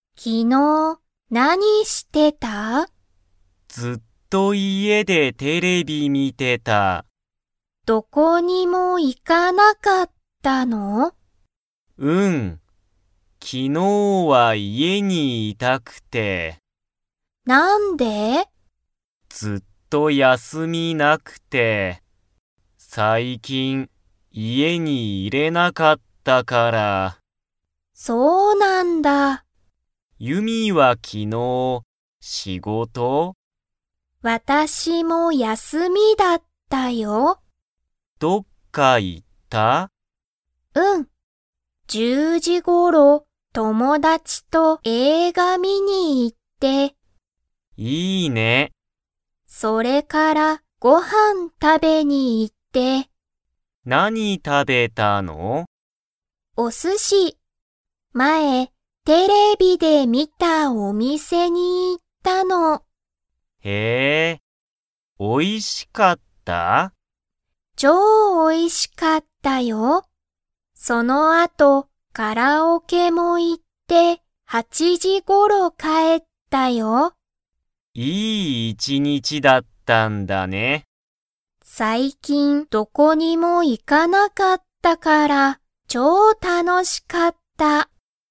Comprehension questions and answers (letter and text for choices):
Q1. カズヤは昨日(きのう)、どこかに行(い)きましたか?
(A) はい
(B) いいえ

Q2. ユミは昨日(きのう)、____頃(ごろ)帰(かえ)った。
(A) 6(ろく)時(じ)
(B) 7(しち)時(じ)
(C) 8(はち)時(じ)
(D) 9(く)時(じ)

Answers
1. (B) いいえ
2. (C) 8(はち)時(じ)

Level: Level 2